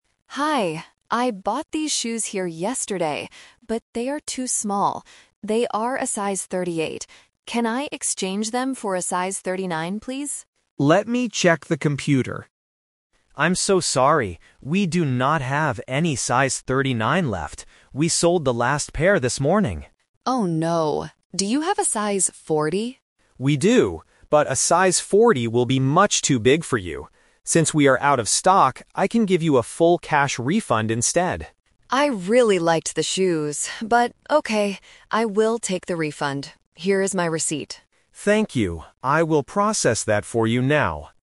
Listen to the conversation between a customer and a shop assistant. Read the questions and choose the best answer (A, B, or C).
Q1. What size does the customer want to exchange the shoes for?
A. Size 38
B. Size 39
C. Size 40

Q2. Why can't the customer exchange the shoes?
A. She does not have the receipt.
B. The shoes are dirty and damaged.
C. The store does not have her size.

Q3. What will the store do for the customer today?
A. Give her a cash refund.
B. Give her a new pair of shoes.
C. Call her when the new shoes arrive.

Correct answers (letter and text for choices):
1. B. Size 39
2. C. The store does not have her size.
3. A. Give her a cash refund.

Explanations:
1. The customer asks, "Can I exchange them for a size 39, please?"
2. The staff member says, "We do not have any size 39 left." This means they are out of stock.
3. This is the "Twist". The staff offers: "I can give you a full cash refund instead," and the customer accepts it.

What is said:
Customer: Hi, I bought these shoes here yesterday, but they are too small. They are a size 38. Can I exchange them for a size 39, please?
Staff: Let me check the computer... I'm so sorry. We do not have any size 39 left. We sold the last pair this morning.
Customer: Oh no. Do you have a size 40?
Staff: We do, but a size 40 will be much too big for you. Since we are out of stock, I can give you a full cash refund instead.
Customer: I really liked the shoes, but okay. I will take the refund. Here is my receipt.